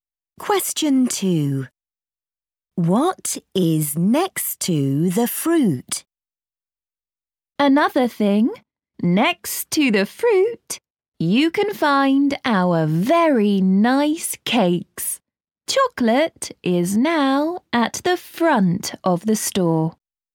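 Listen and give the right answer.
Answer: cakes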